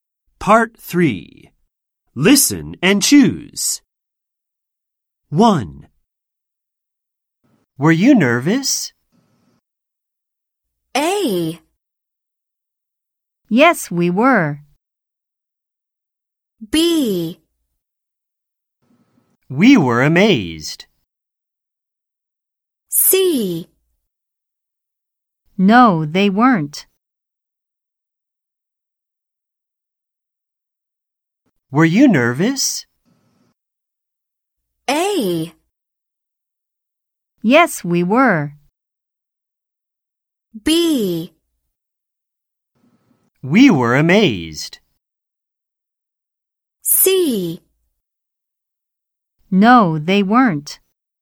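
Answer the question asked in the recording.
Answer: A: Yes, we were.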